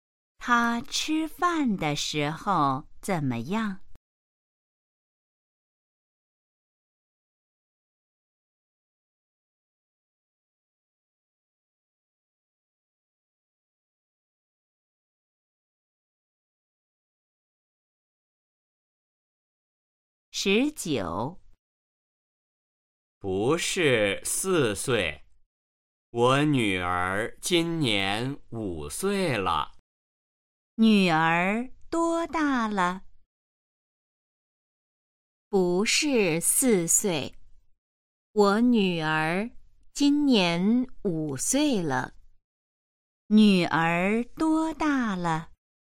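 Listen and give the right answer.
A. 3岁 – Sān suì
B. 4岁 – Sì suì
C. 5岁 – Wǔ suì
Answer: C. 5岁 – Wǔ suì

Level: HSK1- Đề 04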